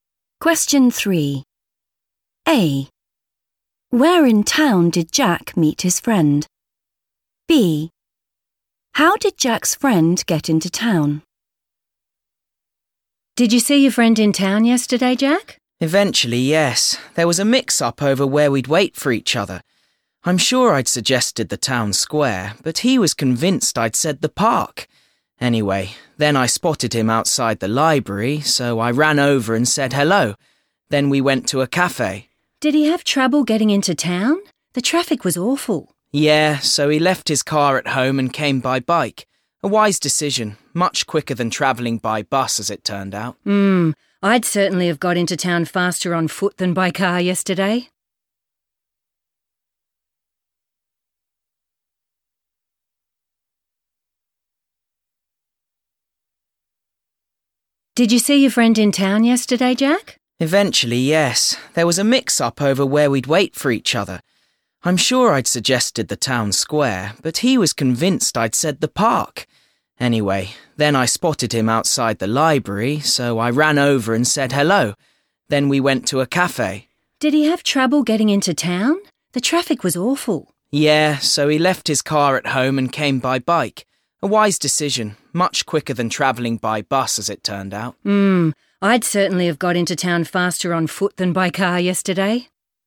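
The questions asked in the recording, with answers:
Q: A. Where in town did Jack meet his friend?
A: outside the library

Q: B. How did Jack's friend get into town?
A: by bike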